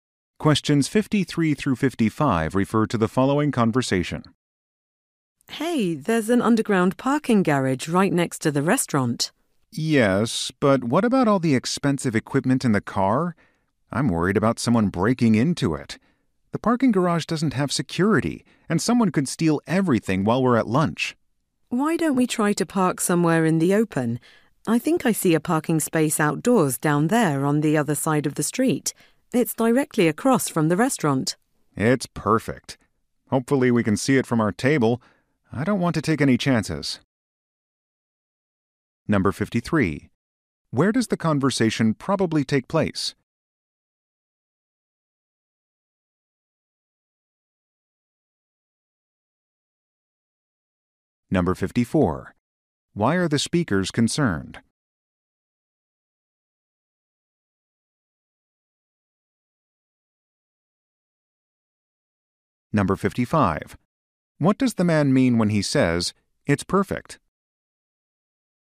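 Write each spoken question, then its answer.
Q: Why are the speakers concerned?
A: Expensive equipment in the car could be stolen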